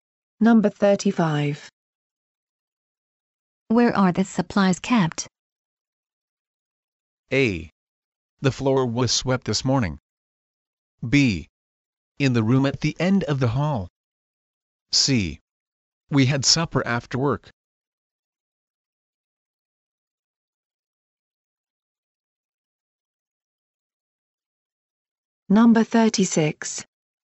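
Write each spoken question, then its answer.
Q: Where are the supplies kept?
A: B: In the room at the end of the hall.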